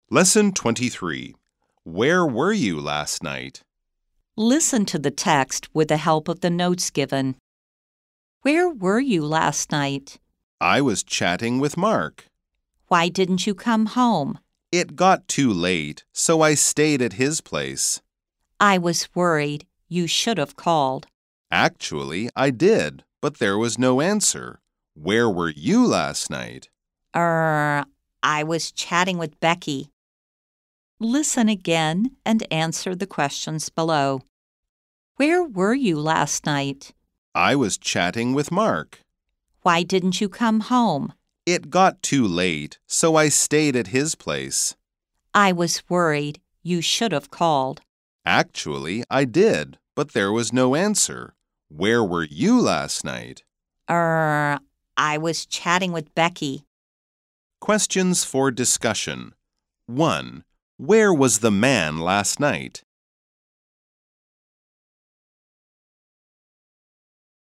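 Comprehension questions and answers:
再次聆聽並回答問題 Listen again and answer the questions below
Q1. Where was the man last night?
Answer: He was chatting with Mark (and stayed at his place).

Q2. Did the man call last night?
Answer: Yes, he called, but there was no answer.

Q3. Where was the woman last night?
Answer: She was chatting with Becky.

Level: 中階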